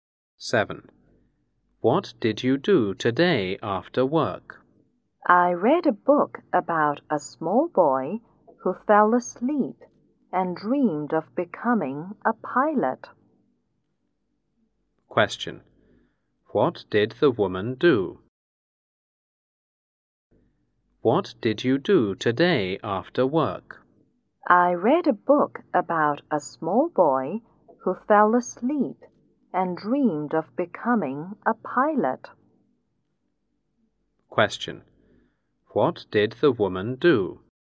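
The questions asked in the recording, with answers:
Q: What did the woman do?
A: She read a book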